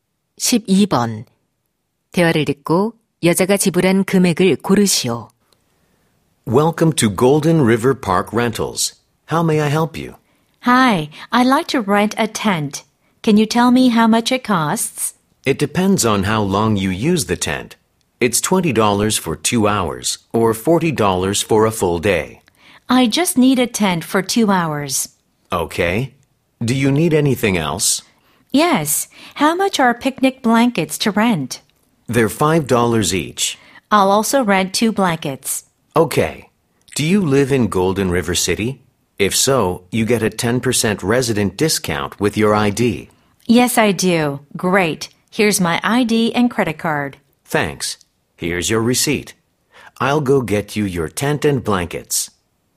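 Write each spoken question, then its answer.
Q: 대화를 듣고 여자가 지불한 금액을 고르시오.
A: $27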